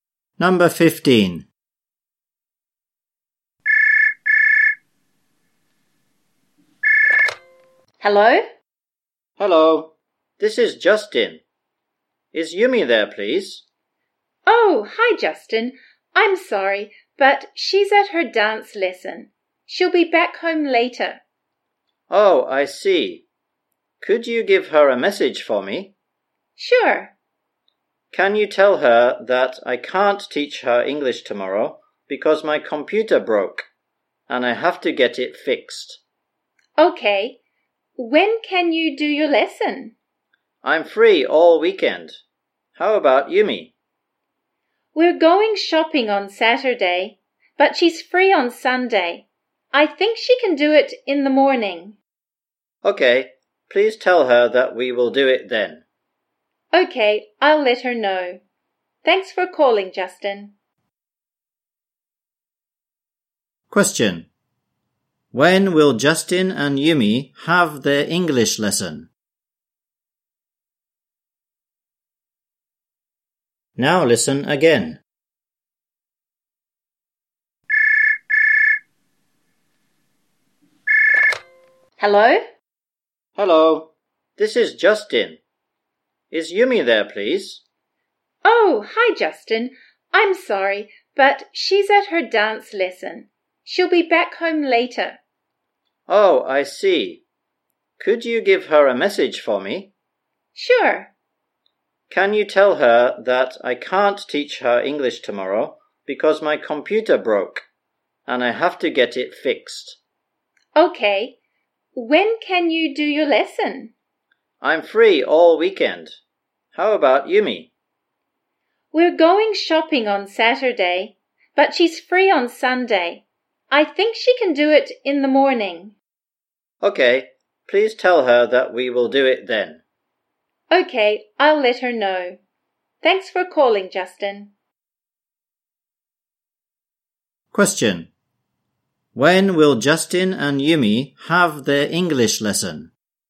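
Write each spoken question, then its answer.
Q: When will Justin and Yumi have their English lesson?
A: On Sunday morning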